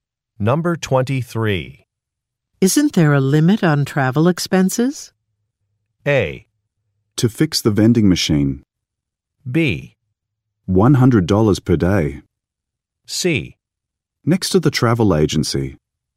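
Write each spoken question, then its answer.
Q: Isn't there a limit on travel expenses?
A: B: $100 per day.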